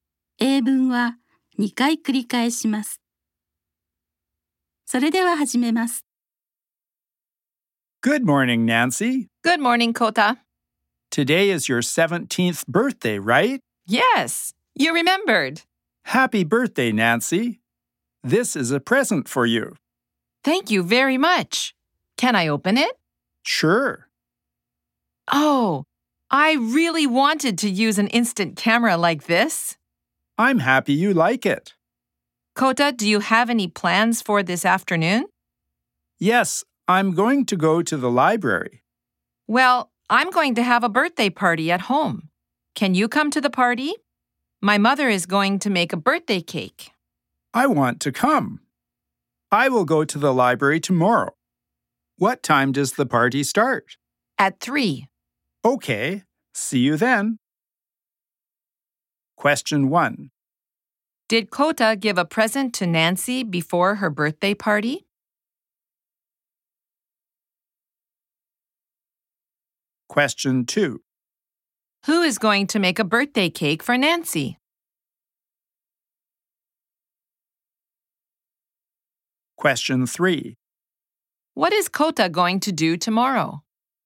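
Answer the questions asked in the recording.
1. Yes, he did.
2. Nancy's mother
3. He is going to go to the library.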